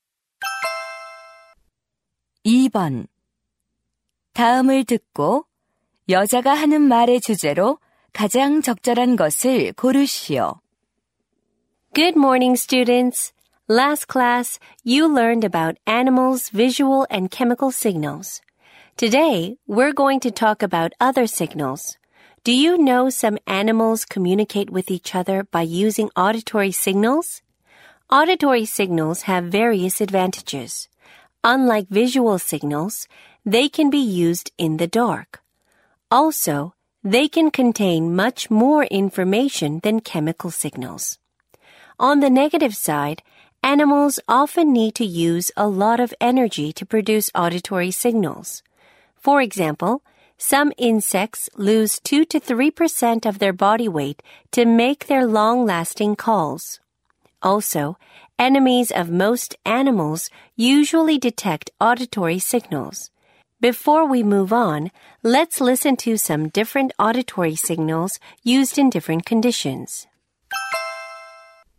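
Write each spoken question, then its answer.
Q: 다음을 듣고 여자가 하는 말의 주제로 가장 적절한 것을 고르시오.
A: 동물의 청각 신호의 장단점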